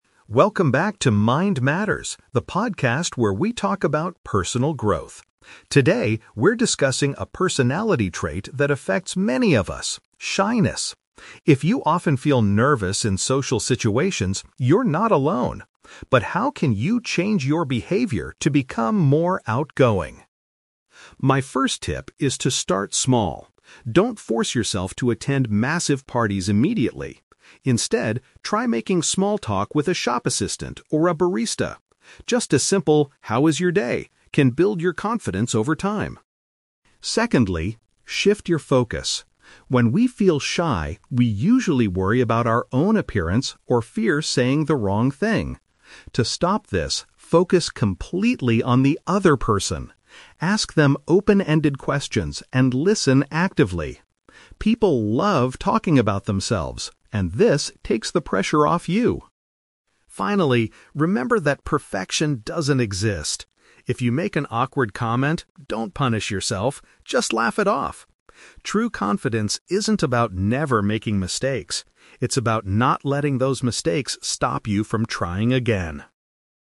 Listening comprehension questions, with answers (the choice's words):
Listen to a podcast host giving advice on overcoming shyness. For each question, choose the correct answer A, B, or (C).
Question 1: What does the host suggest doing FIRST to build confidence?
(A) Going to large events to face your social fears.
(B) Having short conversations with service workers.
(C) Practicing speaking in front of a mirror at home.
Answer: Having short conversations with service workers.

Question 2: According to the podcast, why do people usually feel shy?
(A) They are too concerned about how they look and sound.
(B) They do not know how to ask open-ended questions.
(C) They are often surrounded by very talkative people.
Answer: They are too concerned about how they look and sound.

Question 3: What is the host's final piece of advice?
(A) Apologize immediately if you say something strange.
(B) Accept that making social errors is completely normal.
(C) Stop talking if you feel you are making a mistake.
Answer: Accept that making social errors is completely normal.

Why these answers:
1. The host advises listeners to try "making small talk with a shop assistant or a barista." The phrase "service workers" is a B1-level paraphrase for shop assistants and baristas, and "short conversations" means "small talk."
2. The host states that shy people usually "worry about our own appearance or fear saying the wrong thing." Option A is a perfect paraphrase of this sentence.
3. The host says, "perfection doesn't exist" and if you make an awkward comment, you shouldn't punish yourself. This means it is normal to make social errors (mistakes).

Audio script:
Host: Welcome back to Mind Matters, the podcast where we talk about personal growth. Today, we're discussing a personality trait that affects many of us: shyness. If you often feel nervous in social situations, you're not alone. But how can you change your behavior to become more outgoing?
My first tip is to start small. Don't force yourself to attend massive parties immediately. Instead, try making small talk with a shop assistant or a barista. Just a simple 'how is your day?' can build your confidence over time.
Secondly, shift your focus. When we feel shy, we usually worry about our own appearance or fear saying the wrong thing. To stop this, focus completely on the other person. Ask them open-ended questions and listen actively. People love talking about themselves, and this takes the pressure off you.
Finally, remember that perfection doesn't exist. If you make an awkward comment, don't punish yourself. Just laugh it off. True confidence isn't about never making mistakes; it's about not letting those mistakes stop you from trying again.